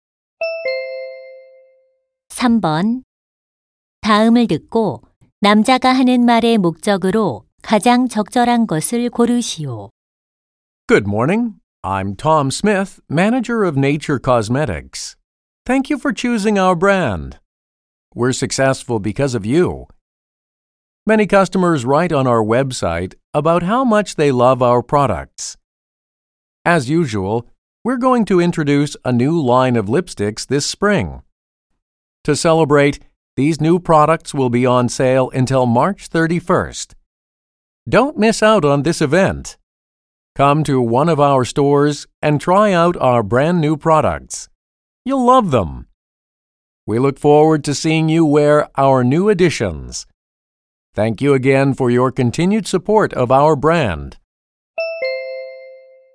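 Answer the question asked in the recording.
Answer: 신제품 립스틱 할인 행사를 홍보하려고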